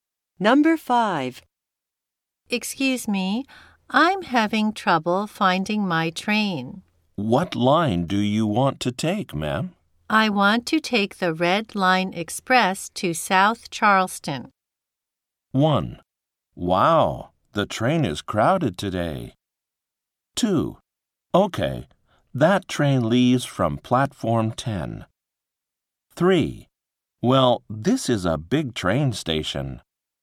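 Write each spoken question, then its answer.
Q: I want to take the Red Line Express to South Charleston.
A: 2: Okay, that train leaves from Platform 10.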